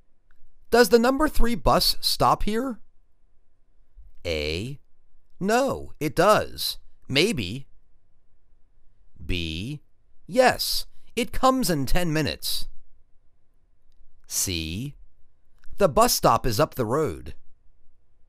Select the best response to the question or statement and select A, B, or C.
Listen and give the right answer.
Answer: Yes, it comes in 10 minutes.